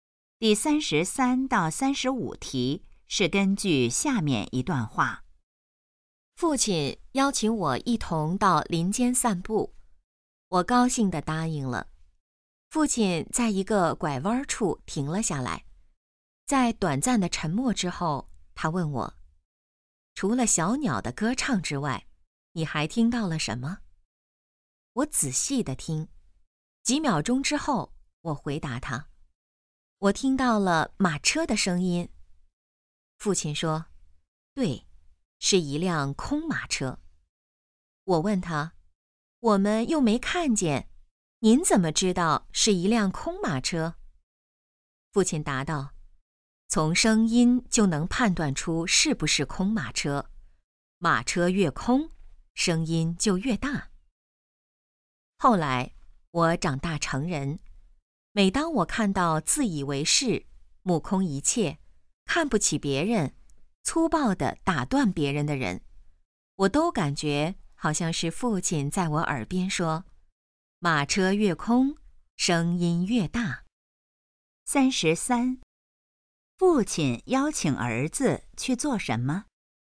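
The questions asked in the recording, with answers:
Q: 父亲邀请儿子去做什么?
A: 到林间散步

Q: 父亲根据什么判断那辆马车是空的?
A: 声音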